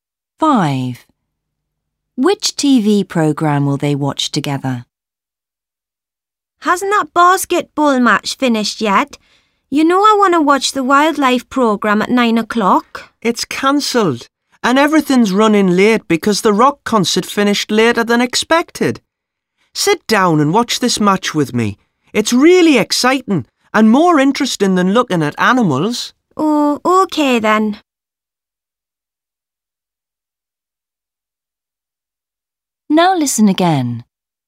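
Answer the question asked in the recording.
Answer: the basketball match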